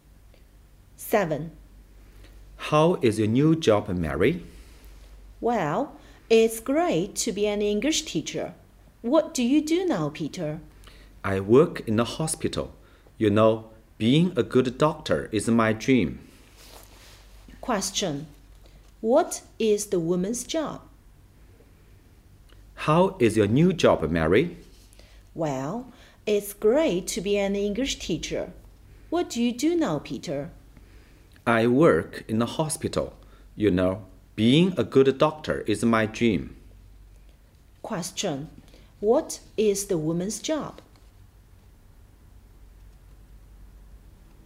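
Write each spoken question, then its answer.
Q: What is the woman's job?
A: An English teacher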